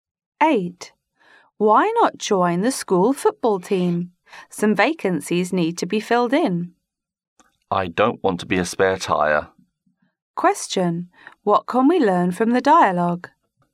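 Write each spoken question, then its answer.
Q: What can we learn from the dialogue?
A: The speaker doesn't want to be a substitute player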